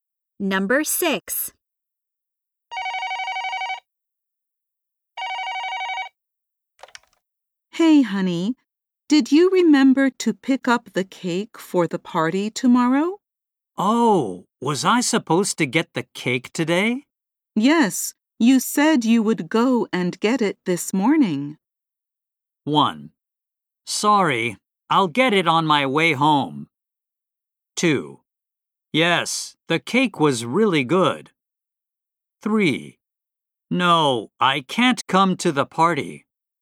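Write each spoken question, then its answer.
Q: Yes, you said you would go and get it this morning.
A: 1: Sorry, I'll get it on my way home.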